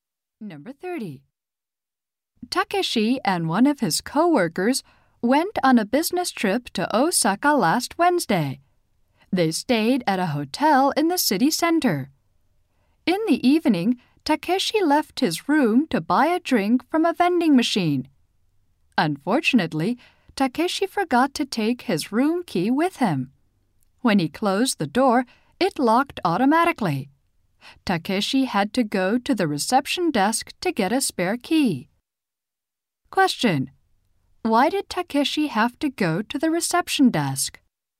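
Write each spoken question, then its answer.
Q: Why did Takeshi have to go to the reception desk?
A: He locked himself out of his room without his key.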